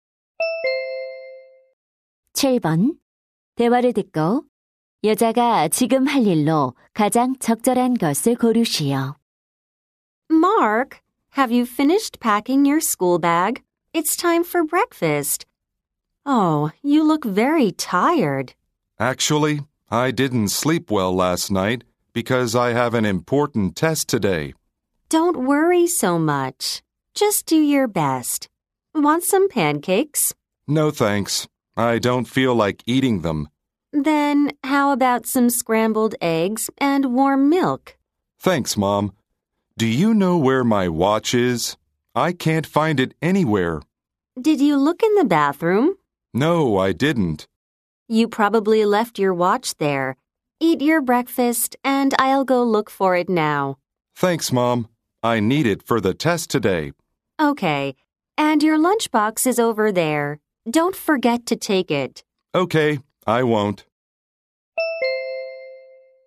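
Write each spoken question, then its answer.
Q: 대화를 듣고 여자가 지금 할 일로 가장 적절한 것을 고르시오.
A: 욕실에서 시계 찾기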